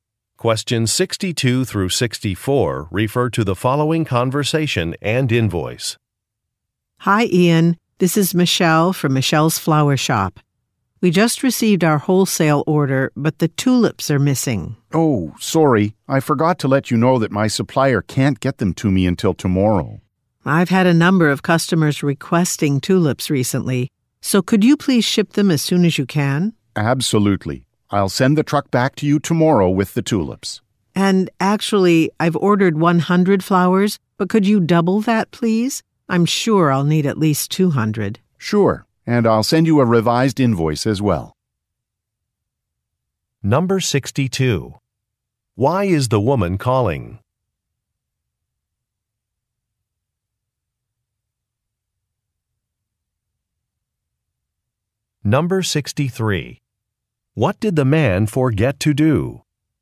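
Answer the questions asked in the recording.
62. The tulips are missing from her order
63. Tell her the tulips would be late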